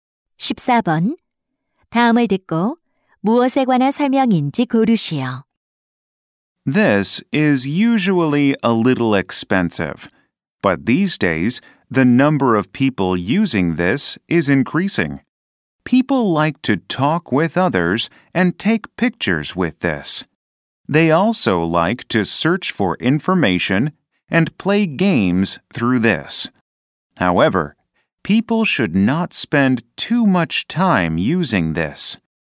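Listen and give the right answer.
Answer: 스마트폰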